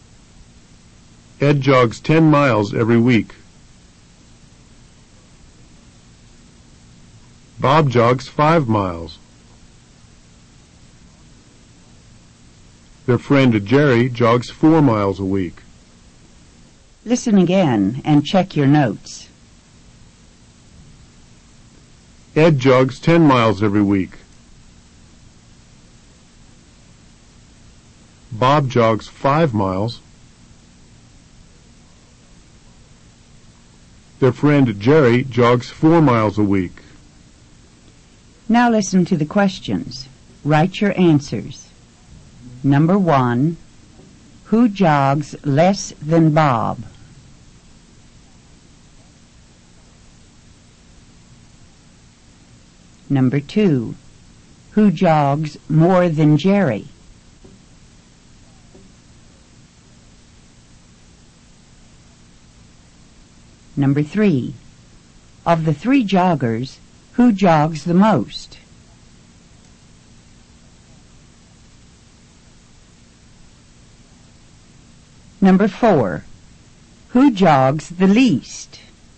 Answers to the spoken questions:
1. Jerry jogs less than Bob.
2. Ed and Bob jog more than Jerry.
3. Ed jogs the most of the three runners.
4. Jerry jogs the least.